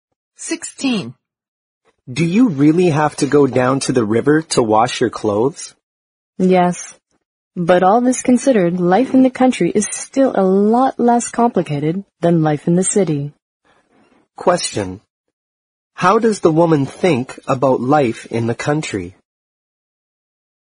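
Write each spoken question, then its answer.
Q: How does the woman think about life in the country?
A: It is much less complicated than city life.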